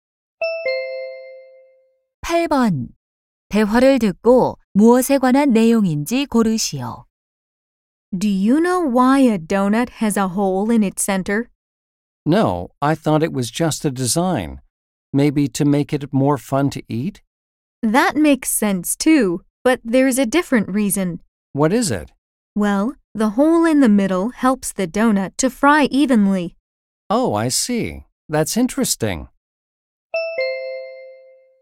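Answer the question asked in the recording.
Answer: 도넛 가운데에 구멍이 있는 이유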